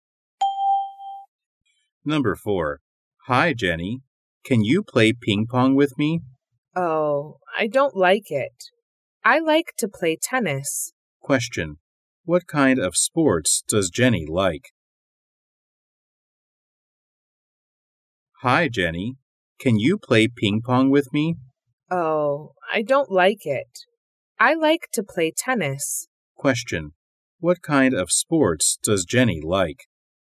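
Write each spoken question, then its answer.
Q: What kind of sports does Jenny like?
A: Tennis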